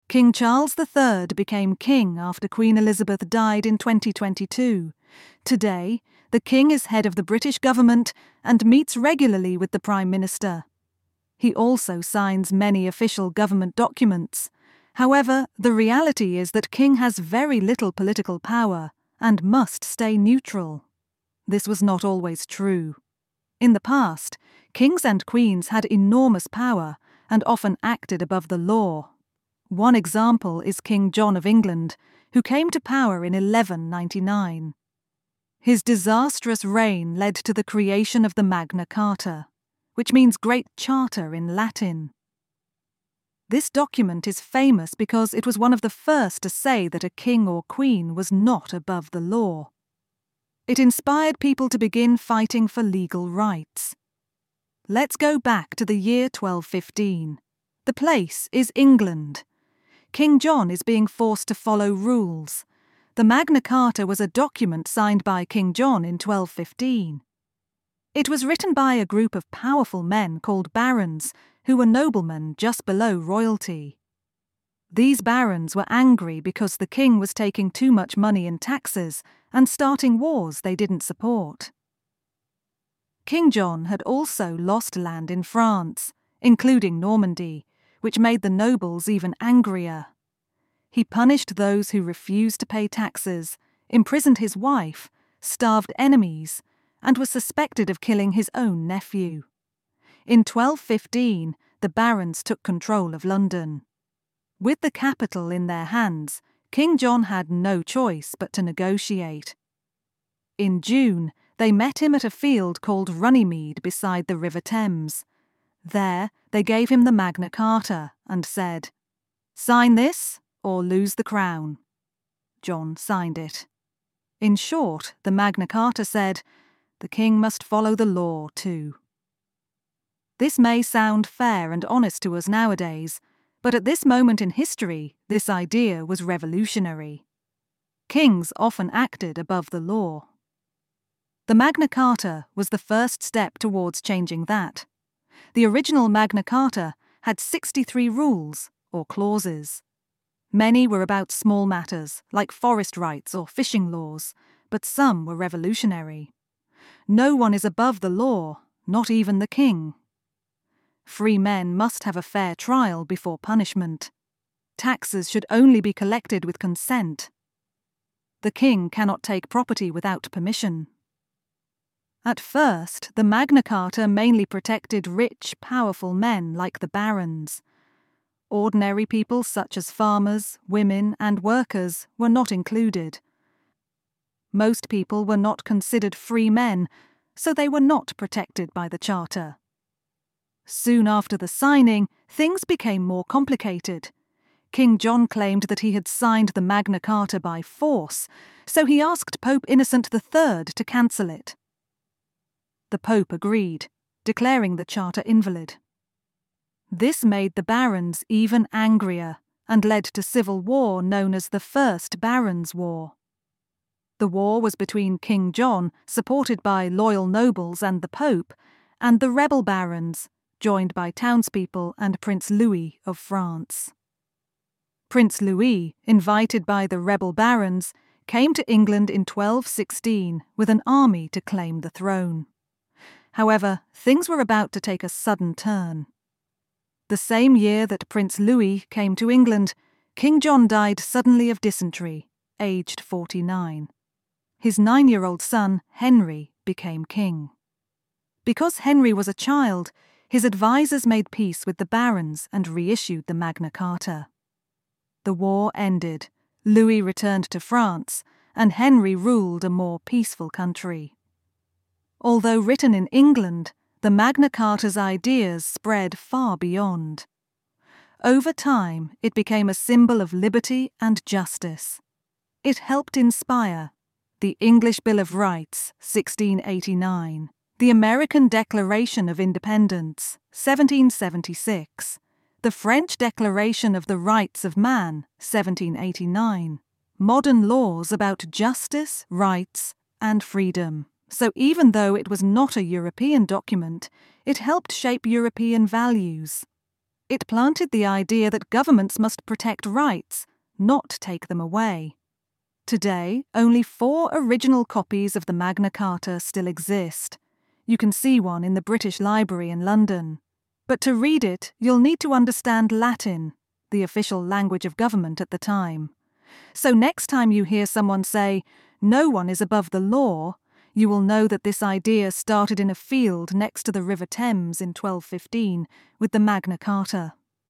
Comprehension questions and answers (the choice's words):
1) What is the current role of the British king in government?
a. He creates laws independently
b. He has full control of the government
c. He holds symbolic power and must stay neutral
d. He chooses the Prime Minister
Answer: He holds symbolic power and must stay neutral

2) What was a key reason the barons created the Magna Carta?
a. They wanted to become kings themselves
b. They were angry about high taxes and unnecessary wars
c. They wanted to remove the Pope's power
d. They believed in democracy for all people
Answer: They were angry about high taxes and unnecessary wars

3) What does the term "Magna Carta" mean?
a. Royal Agreement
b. Grand Kingdom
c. Great Charter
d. Noble Code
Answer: Great Charter

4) What happened at Runnymede in 1215?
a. The king was overthrown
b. A battle took place between France and England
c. King John signed the Magna Carta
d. Parliament was first established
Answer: King John signed the Magna Carta

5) Which of the following was not included in the Magna Carta?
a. The king must follow the law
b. All people could vote in elections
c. Free men must have a fair trial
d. Taxes need consent to be collected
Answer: All people could vote in elections

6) Why did King John later say the Magna Carta was invalid?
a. He claimed it was written in secret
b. He said the barons were not citizens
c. He argued he signed it under force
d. He didn't understand the document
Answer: He argued he signed it under force

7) What was the result of the Pope declaring the Magna Carta invalid?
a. The king was arrested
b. Civil war broke out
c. The barons fled England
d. The French took over England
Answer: Civil war broke out

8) Who ruled after King John died in 1216?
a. Prince Louis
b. His wife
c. His son Henry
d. One of the barons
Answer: His son Henry

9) What was one major limitation of the Magna Carta when it was first signed?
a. It applied to everyone equally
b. It gave women full rights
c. It only protected powerful men like barons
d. It removed the monarchy entirely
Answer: It only protected powerful men like barons

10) Which modern value did the Magna Carta help inspire?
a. Rule by divine right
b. Separation of church and state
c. Government above the law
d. Liberty and justice for all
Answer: Liberty and justice for all

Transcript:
King Charles III became king after Queen Elizabeth died in 2022. Today, the king is head of the British government and meets regularly with the Prime Minister. He also signs many official government documents. However, the reality is that king has very little political power and must stay neutral.
This was not always true. In the past, kings and queens had enormous power and often acted above the law. One example is King John of England, who came to power in 1199. His disastrous reign led to the creation of the Magna Carta (which means "Great Charter" in Latin). This document is famous because it was one of the first to say that a king or queen was not above the law. It inspired people to begin fighting for legal rights.
What Is the Magna Carta?
Let's go back to the year 1215. The place is England. King John is being forced to follow rules.
The Magna Carta was a document signed by King John in 1215. It was written by a group of powerful men called barons who were noblemen just below royalty. These barons were angry because the king was taking too much money in taxes and starting wars they didn't support. King John had also lost land in France, including Normandy, which made the nobles even angrier. He punished those who refused to pay taxes, imprisoned his wife, starved enemies, and was suspected of killing his own nephew.
In 1215, the barons took control of London. With the capital in their hands, King John had no choice but to negotiate. In June, they met him at a field called Runnymede beside the River Thames. There, they gave him the Magna Carta and said, "Sign this, or lose the crown." John signed it.
In short, the Magna Carta said, "The king must follow the law too." This may sound fair and honest to us nowadays, but at this moment in history, this idea was revolutionary! The Magna Carta was the first step towards changing that.
What was in the Magna Carta?
The original Magna Carta had 63 rules, or clauses. Many were about small matters, like forest rights or fishing laws, but some were revolutionary:
• No one is above the law—not even the king.
• Free men must have a fair trial before punishment.
• Taxes should only be collected with consent.
• The king cannot take property without permission.
At first, the Magna Carta mainly protected rich, powerful men like the barons. Ordinary people such as farmers, women, and workers were not included. Most people were not considered "free men," so they were not protected by the charter.
Soon after the signing, things became more complicated. King John claimed that he had signed the Magna Carta by force, so he asked Pope Innocent III to cancel it. The Pope agreed, declaring the charter invalid. This made the barons even angrier and led to civil war known as the First Barons' War.
The war was between King John (supported by loyal nobles and the Pope) and the rebel barons (joined by townspeople and Prince Louis of France). Prince Louis, invited by the rebel barons, came to England in 1216 with an army to claim the throne.
However, things were about to take a sudden turn. The same year that Prince Louis came to England, King John died suddenly of dysentery, aged 49. His 9-year-old son, Henry, became king. Because Henry was a child, his advisers made peace with the barons and reissued the Magna Carta. The war ended. Louis returned to France, and Henry ruled a more peaceful country.
How important was the Magna Carta for Europe?
Although written in England, the Magna Carta's ideas spread far beyond. Over time, it became a symbol of liberty and justice.
It helped inspire:
• The English Bill of Rights (1689)
• The American Declaration of Independence (1776)
• The French Declaration of the Rights of Man (1789)
• Modern laws about justice, rights, and freedom
So even though it was not a European document, it helped shape European values. It planted the idea that governments must protect rights - not take them away.
Today, only four original copies of the Magna Carta still exist. You can see one in the British Library in London. But to read it, you'll need to understand Latin - the official language of government at the time.
So next time you hear someone say, "No one is above the law," you will know that this idea started in a field next to the river Thames in 1215 with the Magna Carta.